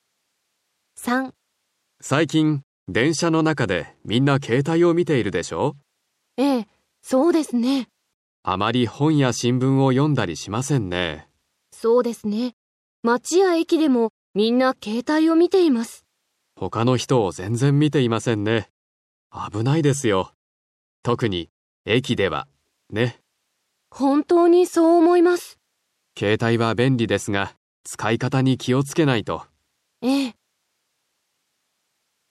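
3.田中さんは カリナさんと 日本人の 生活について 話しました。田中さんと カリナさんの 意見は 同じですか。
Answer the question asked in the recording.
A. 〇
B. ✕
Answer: 〇

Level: Cơ bản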